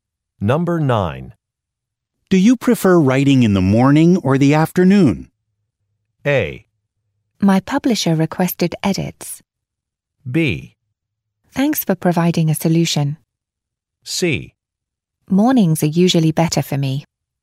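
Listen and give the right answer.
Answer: C: Mornings are usually better for me.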